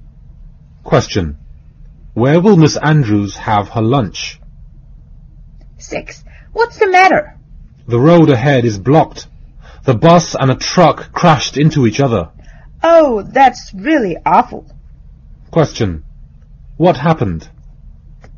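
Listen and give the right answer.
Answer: A bus and a truck crashed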